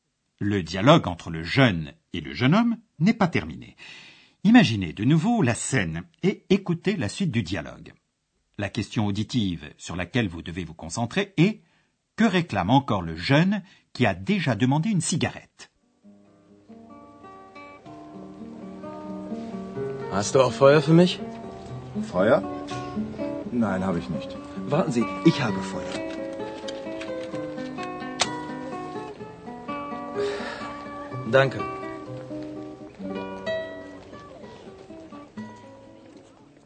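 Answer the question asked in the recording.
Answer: Du feu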